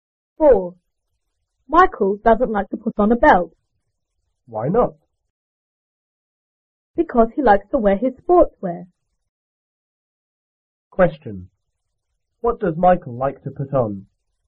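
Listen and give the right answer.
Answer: His sportswear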